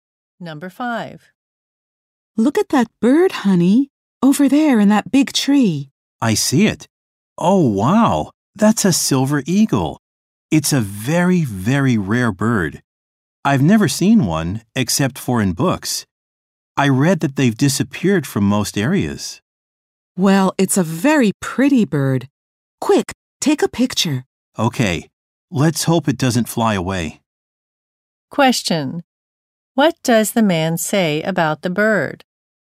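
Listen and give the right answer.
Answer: It is very rare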